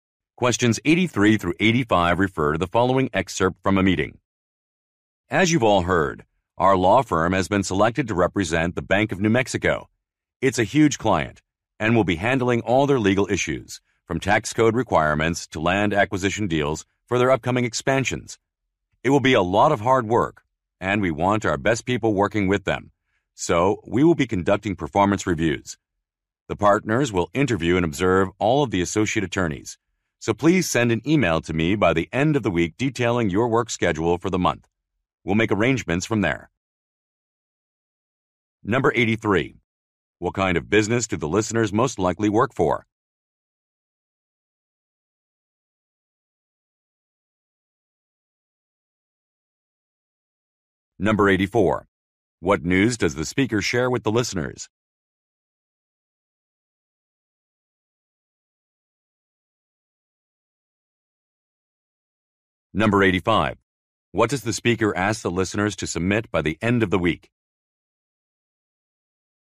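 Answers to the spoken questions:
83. A law firm
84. The firm was chosen to represent the Bank of New Mexico
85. Their work schedule for the month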